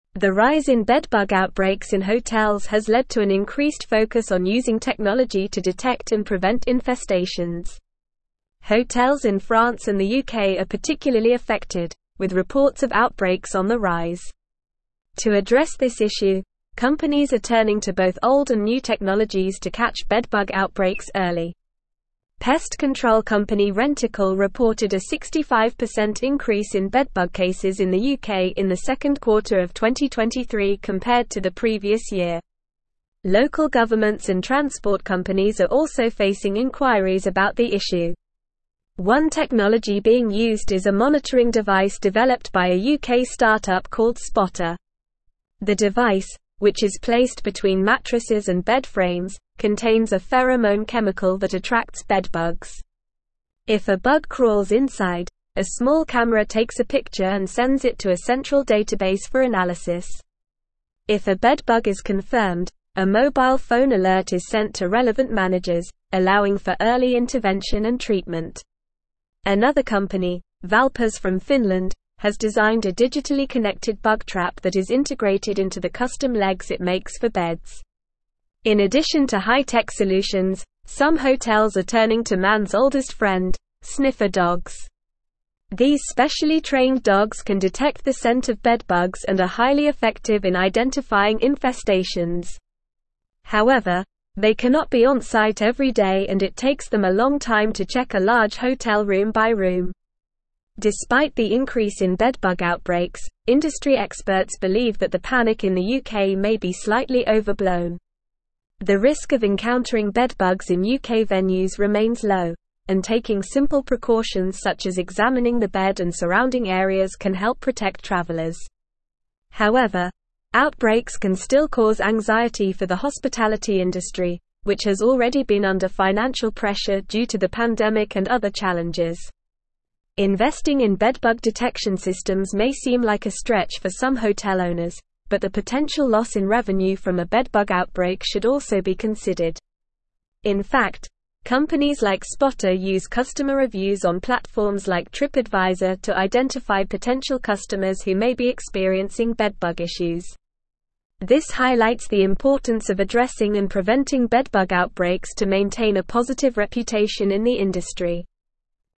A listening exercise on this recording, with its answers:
Listen and Fill in the Gaps:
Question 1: The rise in bedbug outbreaks in hotels has led to an (1)______d focus on (2)______ technology to detect and prevent infestations.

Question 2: The rise in bedbug outbreaks in hotels has led to an (1)______d focus on (2)______ technology to detect and prevent infestations.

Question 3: Pest control company Rentokil (3)______ a 65% increase in bedbug cases in the UK in the second quarter of 2023 compared to the previous year.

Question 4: Local governments and transport companies are also (4)______ inquiries about the issue.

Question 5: The device, which is placed between mattresses and bedframes, contains a pheromone (5)______ that attracts bedbugs.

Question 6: If a bug crawls inside, a small camera (6)______ a picture and (7)______ it to a central database for analysis.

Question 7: If a bug crawls inside, a small camera (6)______ a picture and (7)______ it to a central database for analysis.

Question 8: Another company, Valpas from Finland, has designed a digitally-connected bug trap that is integrated into the (8)______ legs it makes for beds.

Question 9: These specially (9)______ dogs can detect the scent of bedbugs and are highly effective in identifying infestations.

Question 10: The risk of encountering bedbugs in UK (10)______ remains low, and taking (11)______ precautions such as (12)______ the bed and surrounding areas can help protect travelers.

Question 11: The risk of encountering bedbugs in UK (10)______ remains low, and taking (11)______ precautions such as (12)______ the bed and surrounding areas can help protect travelers.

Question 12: The risk of encountering bedbugs in UK (10)______ remains low, and taking (11)______ precautions such as (12)______ the bed and surrounding areas can help protect travelers.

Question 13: However, outbreaks can still cause anxiety for the hospitality (13)______, which has already been under financial pressure due to the pandemic and other challenges.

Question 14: Investing in bedbug detection systems may seem like a stretch for some hotel (14)______, but the potential loss in revenue from a bedbug outbreak should also be considered.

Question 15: In fact, companies like Spotta use customer reviews on platforms like (15)______ to identify potential customers who may be experiencing bedbug (16)______.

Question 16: In fact, companies like Spotta use customer reviews on platforms like (15)______ to identify potential customers who may be experiencing bedbug (16)______.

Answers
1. increase
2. using
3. reported
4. facing
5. chemical
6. takes
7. sends
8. custom
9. trained
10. venues
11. simple
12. examining
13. industry
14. owners
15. TripAdvisor
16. issues

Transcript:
The rise in bedbug outbreaks in hotels has led to an increased focus on using technology to detect and prevent infestations. Hotels in France and the UK are particularly affected, with reports of outbreaks on the rise. To address this issue, companies are turning to both old and new technologies to catch bedbug outbreaks early. Pest control company Rentokil reported a 65% increase in bedbug cases in the UK in the second quarter of 2023 compared to the previous year. Local governments and transport companies are also facing inquiries about the issue.
One technology being used is a monitoring device developed by a UK start-up called Spotta. The device, which is placed between mattresses and bedframes, contains a pheromone chemical that attracts bedbugs. If a bug crawls inside, a small camera takes a picture and sends it to a central database for analysis. If a bedbug is confirmed, a mobile phone alert is sent to relevant managers, allowing for early intervention and treatment. Another company, Valpas from Finland, has designed a digitally-connected bug trap that is integrated into the custom legs it makes for beds.
In addition to high-tech solutions, some hotels are turning to man's oldest friend: sniffer dogs. These specially trained dogs can detect the scent of bedbugs and are highly effective in identifying infestations. However, they cannot be onsite every day and it takes them a long time to check a large hotel room by room.
Despite the increase in bedbug outbreaks, industry experts believe that the panic in the UK may be slightly overblown. The risk of encountering bedbugs in UK venues remains low, and taking simple precautions such as examining the bed and surrounding areas can help protect travelers. However, outbreaks can still cause anxiety for the hospitality industry, which has already been under financial pressure due to the pandemic and other challenges. Investing in bedbug detection systems may seem like a stretch for some hotel owners, but the potential loss in revenue from a bedbug outbreak should also be considered.
In fact, companies like Spotta use customer reviews on platforms like TripAdvisor to identify potential customers who may be experiencing bedbug issues. This highlights the importance of addressing and preventing bedbug outbreaks to maintain a positive reputation in the industry.

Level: Level 4